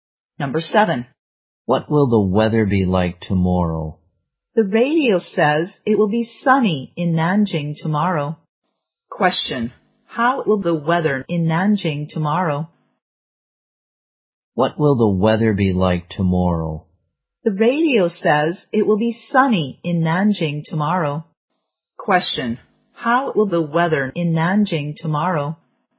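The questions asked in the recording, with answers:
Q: Question, how will the weather in Nanjing tomorrow?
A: Sunny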